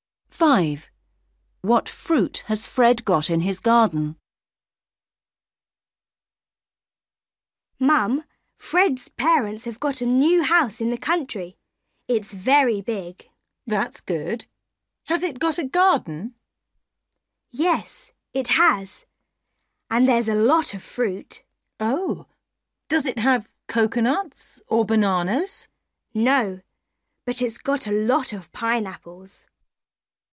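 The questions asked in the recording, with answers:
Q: What fruit has Fred got in his garden?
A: pineapples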